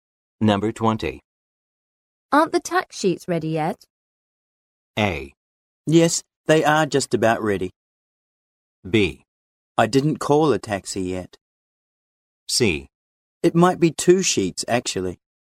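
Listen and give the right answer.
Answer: A: Yes, they are just about ready.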